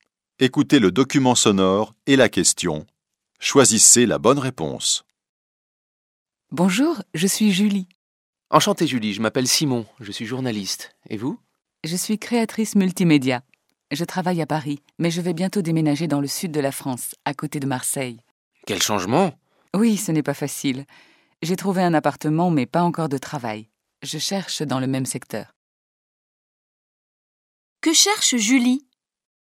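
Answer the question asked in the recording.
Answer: Un travail de créatrice multimédia (dans le même secteur)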